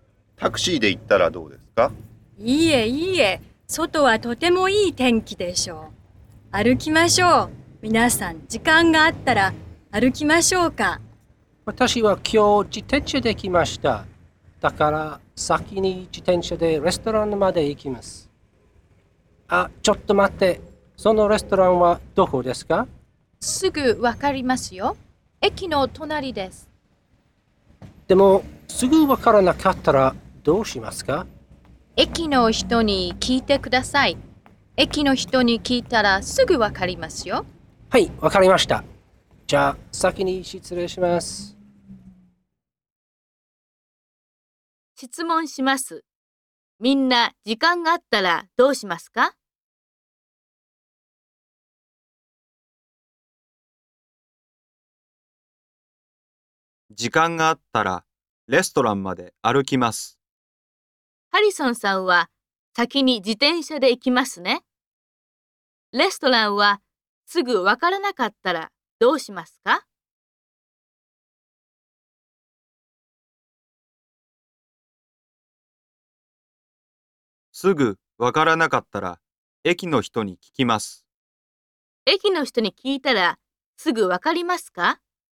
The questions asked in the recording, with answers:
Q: みんな、時間があったらどうしますか?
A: 時間があったら、レストランまで歩きます。

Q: 駅の人に聞いたら、すぐわかりますか?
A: はい、駅の人に聞いたらすぐわかります。